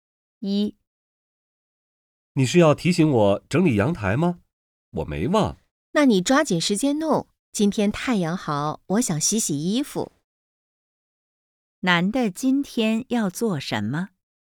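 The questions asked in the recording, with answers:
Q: 男的今天要做什么?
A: 整理阳台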